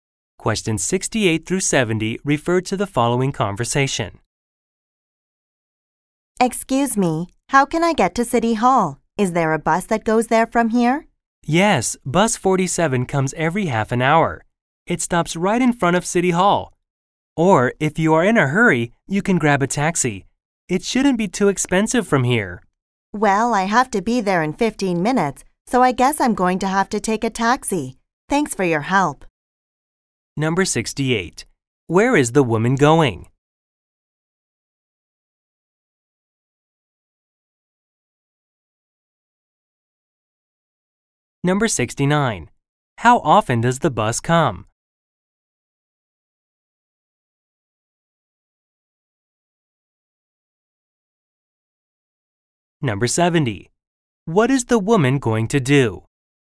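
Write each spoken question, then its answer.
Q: Where is the woman going?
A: City Hall

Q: How often does the bus come?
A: Every half an hour

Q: What is the woman going to do?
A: Take a taxi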